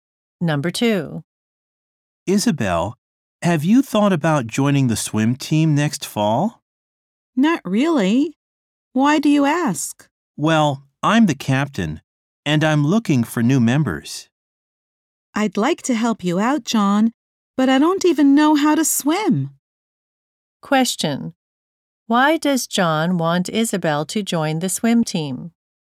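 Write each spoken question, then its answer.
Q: Why does John want Isabel to join the swim team?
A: He is the captain and is looking for new members.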